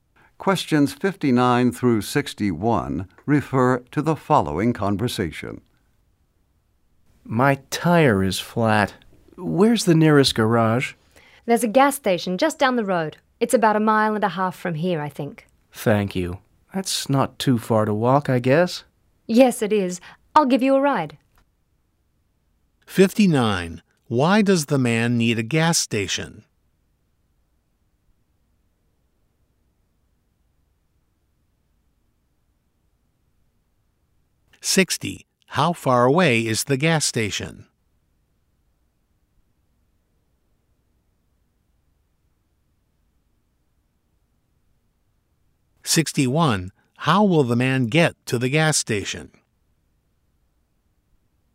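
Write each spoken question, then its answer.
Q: Why does the man need a gas station?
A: His tire is flat

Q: How far away is the gas station?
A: About a mile and a half

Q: How will the man get to the gas station?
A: He will get a ride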